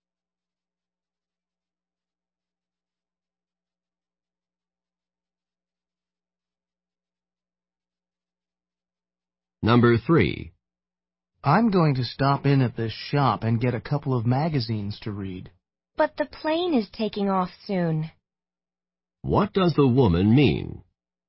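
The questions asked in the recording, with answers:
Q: What does the woman mean?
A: There isn't enough time to stop at the shop before the plane leaves.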